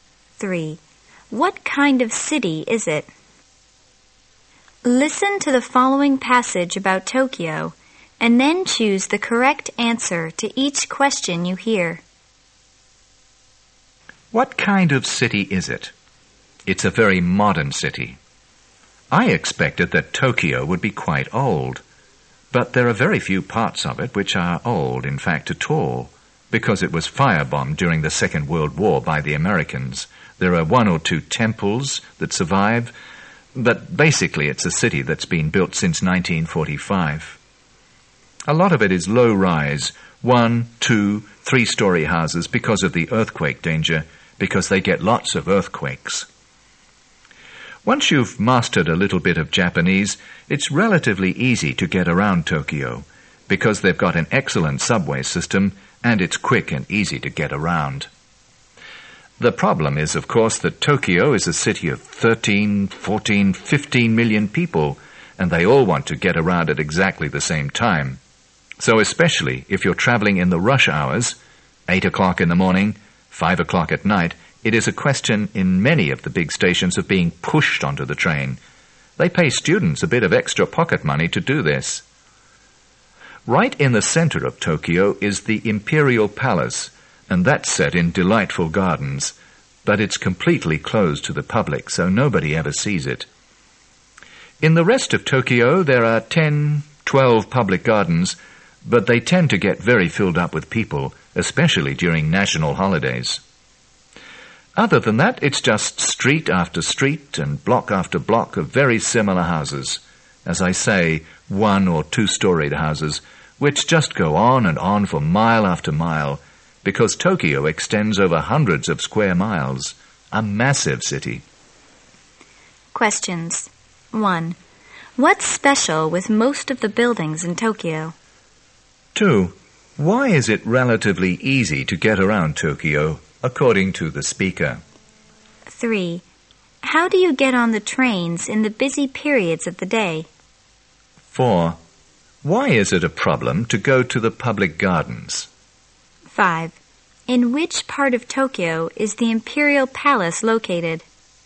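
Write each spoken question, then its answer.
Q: Why is it relatively easy to get around Tokyo, according to the speaker?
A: It has an excellent subway system

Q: How do you get on the trains in the busy periods of the day?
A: You are pushed onto the train (by paid students)

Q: Why is it a problem to go to the public gardens?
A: They get very crowded

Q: In which part of Tokyo is the Imperial Palace located?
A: In the center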